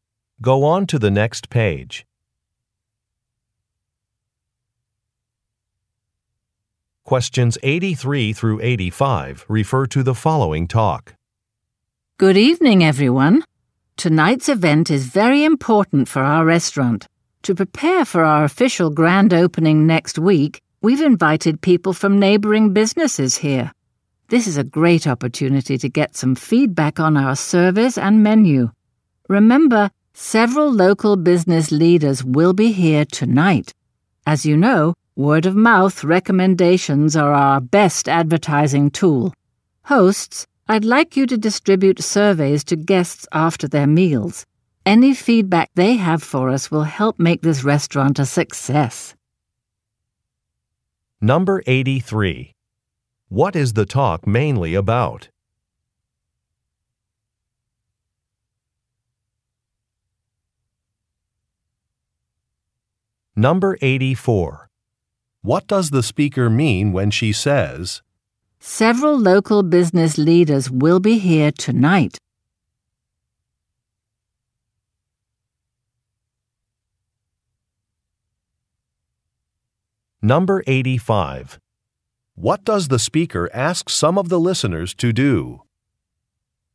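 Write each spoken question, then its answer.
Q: What is the talk mainly about?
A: A special event before the restaurant's grand opening

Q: What does the speaker ask some of the listeners to do?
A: Give surveys to guests after their meals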